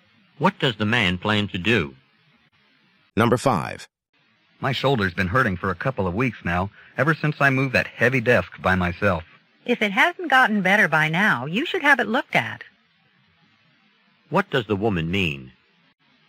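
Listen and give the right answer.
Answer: The man should see a doctor about his shoulder.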